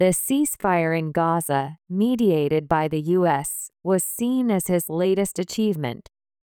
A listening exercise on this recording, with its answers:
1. The ceasefire in Gaza, mediated by the U.S., ( ).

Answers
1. was seen as his latest achievement

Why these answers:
弱音の機能語は聞き取りが難しい箇所ですが、文脈から「彼の(=トランプ大統領の)」という意味が入ることが想定できます。

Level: 中級脱出